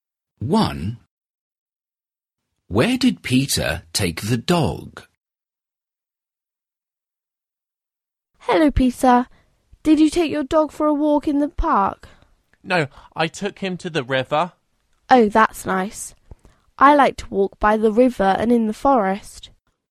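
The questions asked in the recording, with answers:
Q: Where did Peter take the dog?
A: to the river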